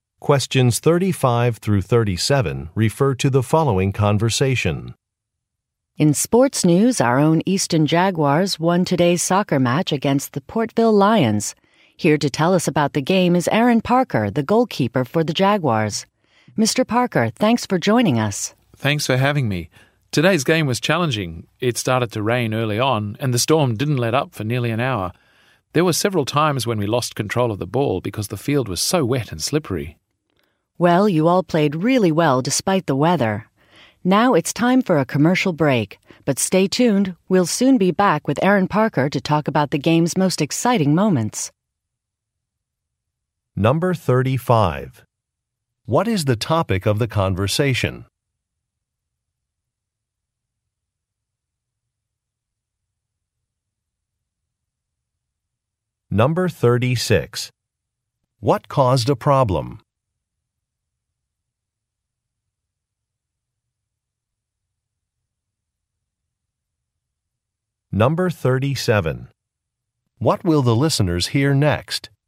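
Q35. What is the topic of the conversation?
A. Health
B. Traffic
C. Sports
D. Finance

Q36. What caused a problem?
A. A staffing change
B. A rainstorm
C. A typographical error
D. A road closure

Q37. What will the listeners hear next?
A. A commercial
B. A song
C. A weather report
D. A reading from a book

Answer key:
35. C
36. B
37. A

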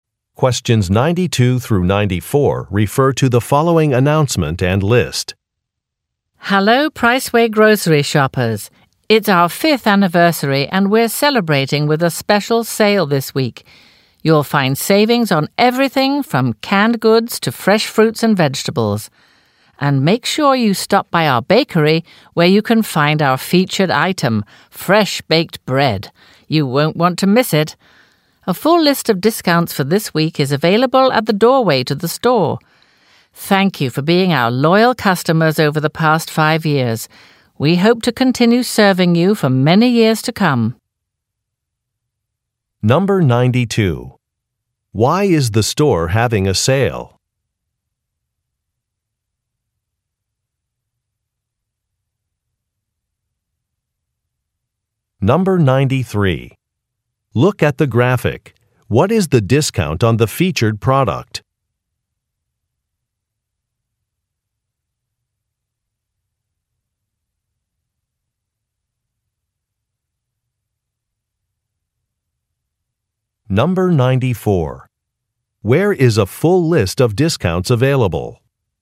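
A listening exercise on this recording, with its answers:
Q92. Why is the store having a sale?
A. To celebrate an anniversary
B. To promote a grand opening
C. To compete with a nearby store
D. To introduce new products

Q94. Where is a full list of discounts available?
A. Near the bakery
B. In the local newspaper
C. At the entrance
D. By each cash register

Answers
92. A
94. C

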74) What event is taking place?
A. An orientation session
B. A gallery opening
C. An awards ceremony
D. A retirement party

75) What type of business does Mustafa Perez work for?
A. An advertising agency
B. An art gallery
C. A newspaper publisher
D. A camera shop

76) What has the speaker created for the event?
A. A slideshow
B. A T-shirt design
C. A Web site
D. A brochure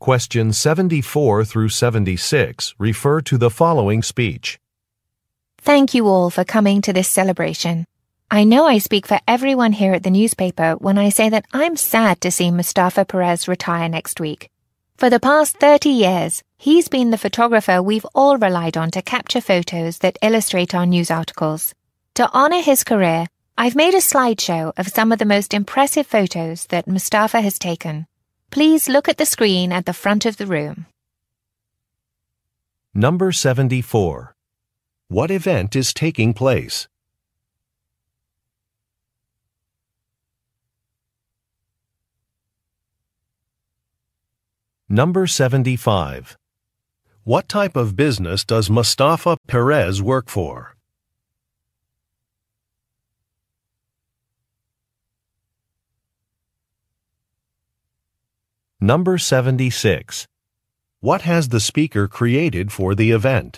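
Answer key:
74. D
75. C
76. A

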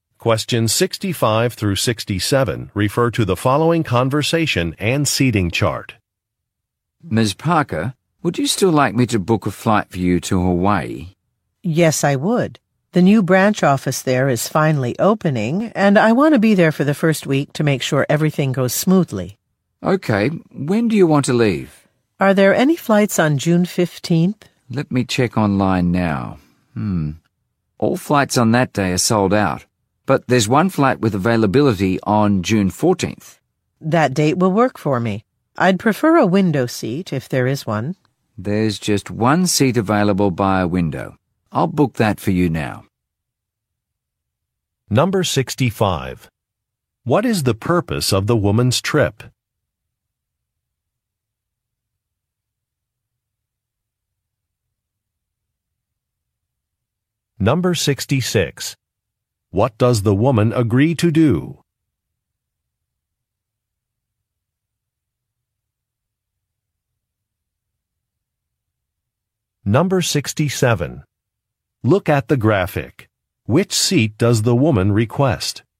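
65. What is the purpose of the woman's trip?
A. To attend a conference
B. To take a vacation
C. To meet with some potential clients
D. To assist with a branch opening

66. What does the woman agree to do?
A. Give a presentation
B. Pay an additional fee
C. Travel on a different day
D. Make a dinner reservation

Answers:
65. D
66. C

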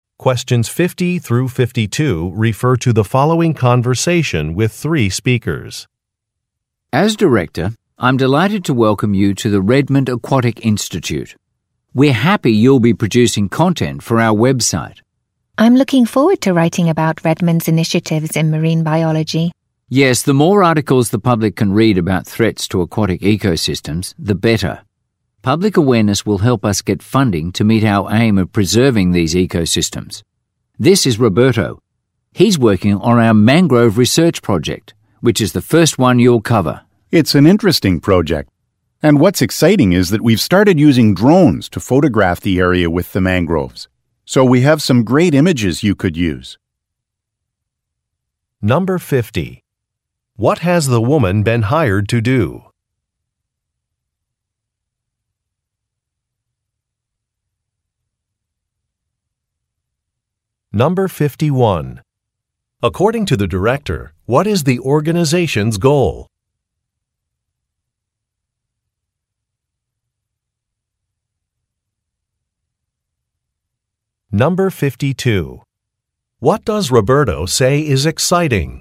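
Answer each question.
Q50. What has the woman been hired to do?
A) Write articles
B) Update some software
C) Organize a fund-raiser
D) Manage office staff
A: A

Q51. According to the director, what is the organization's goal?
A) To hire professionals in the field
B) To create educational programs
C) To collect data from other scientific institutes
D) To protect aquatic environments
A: D

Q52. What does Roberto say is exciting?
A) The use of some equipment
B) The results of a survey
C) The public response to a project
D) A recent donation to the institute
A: A

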